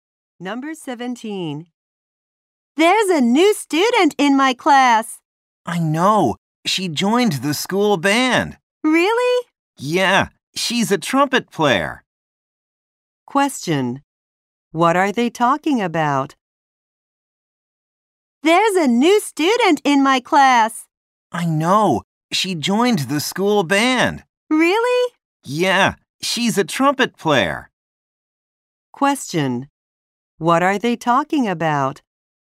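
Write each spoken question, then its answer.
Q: What are they talking about?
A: A new student.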